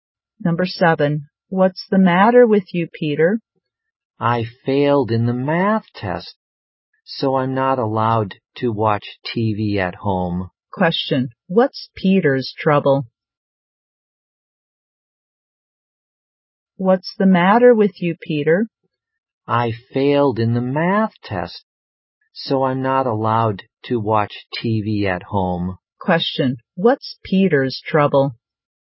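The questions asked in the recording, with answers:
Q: Question, what's Peter's trouble?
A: He failed the math test and isn't allowed to watch TV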